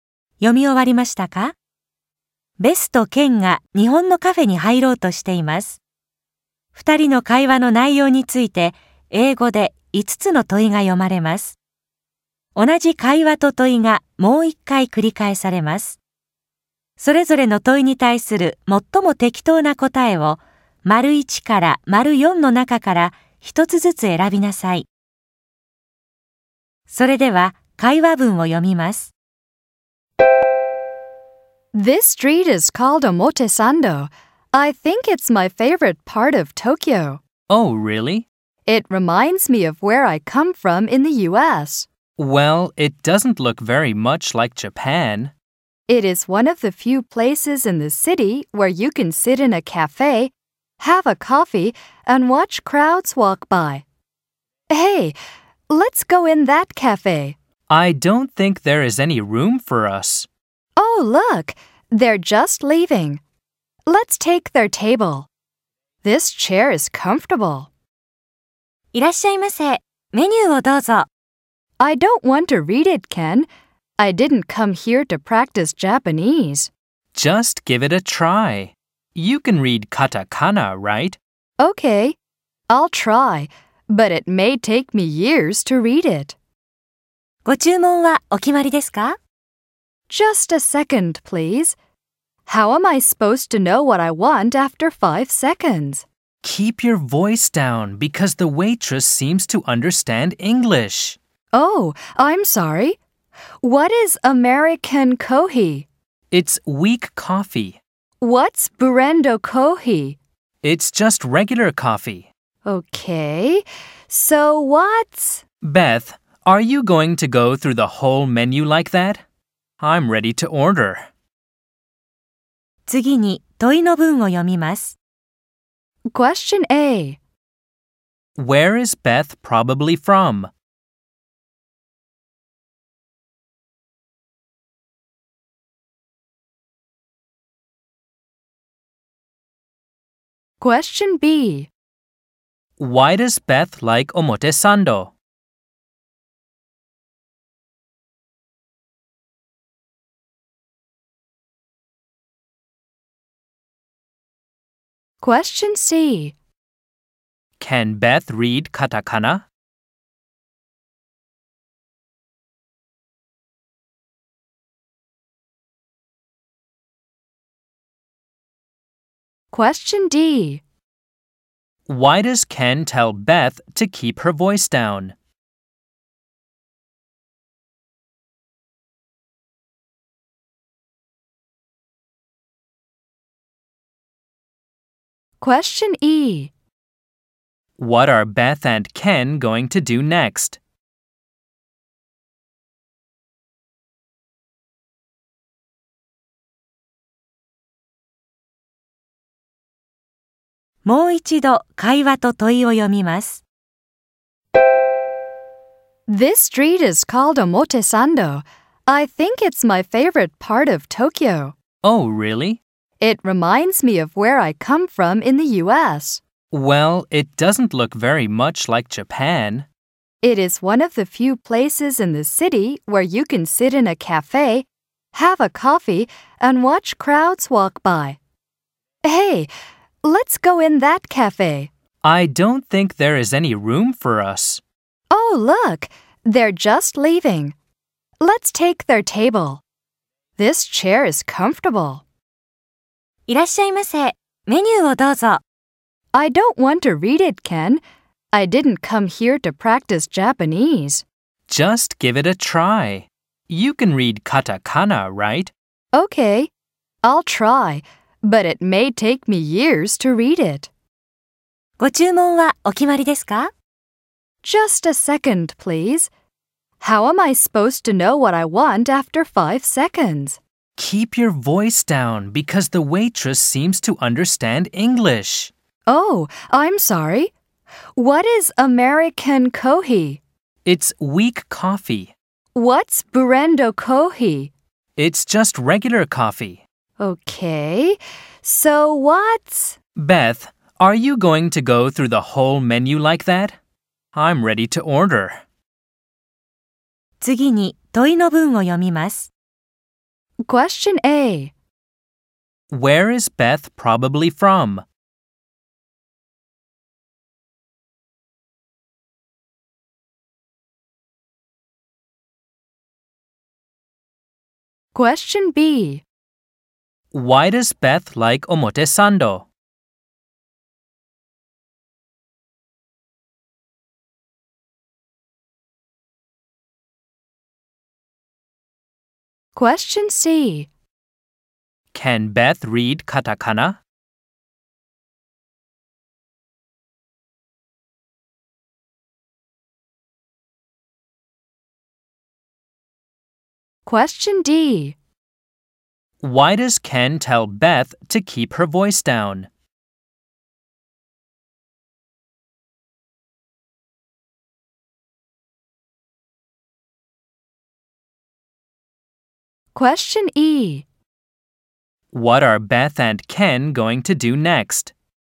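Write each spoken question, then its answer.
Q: Where is Beth probably from?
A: The U.S.

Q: Why does Beth like Omotesando?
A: It reminds her of where she comes from in the U.S.

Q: Why does Ken tell Beth to keep her voice down?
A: The waitress seems to understand English

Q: What are Beth and Ken going to do next?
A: Order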